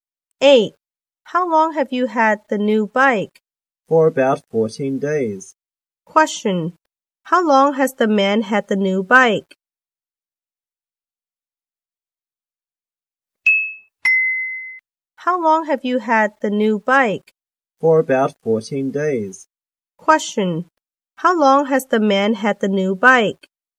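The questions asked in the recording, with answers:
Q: How long has the man had the new bike?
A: For about 14 days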